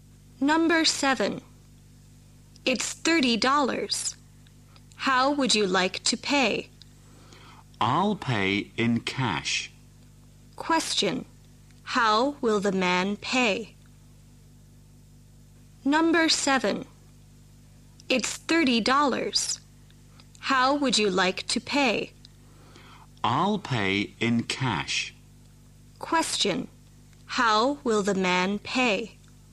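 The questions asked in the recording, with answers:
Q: How will the man pay?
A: In cash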